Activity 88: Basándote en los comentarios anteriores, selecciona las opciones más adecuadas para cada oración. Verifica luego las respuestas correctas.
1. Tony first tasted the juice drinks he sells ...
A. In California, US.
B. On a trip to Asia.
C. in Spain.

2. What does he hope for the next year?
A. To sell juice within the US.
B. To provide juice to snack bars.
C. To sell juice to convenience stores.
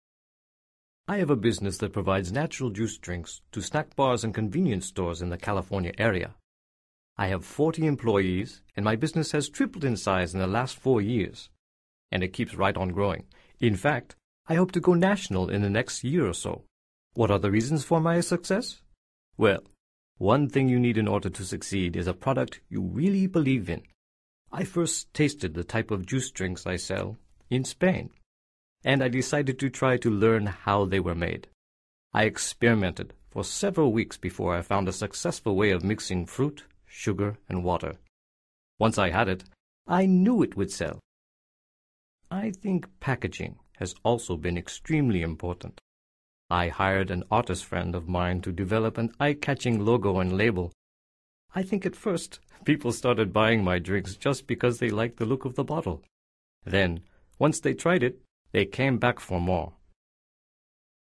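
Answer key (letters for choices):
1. C
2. A

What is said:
I have a business that provides natural juice drinks to snack bars and convenience stores in the California area. I have 40 employees, and my business has tripled in size in the last four years, and it keeps right on growing. In fact, I hope to go national in the next year or so. What are the reasons for my success? Well, one thing you need in order to succeed is a product you really believe in. I first tasted the type of juice drinks I sell in Spain, and I decided to try to learn how they were made. I experimented for several weeks before I found a successful way of mixing fruit, sugar, and water. Once I had it, I knew it would sell. I think packaging has also been extremely important. I hired an artist friend of mine to develop an eye-catching logo and label. I think at first people started buying my drinks just because they liked the look of the bottle. 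Then, once they tried it, they came back for more.

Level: Nivel Avanzado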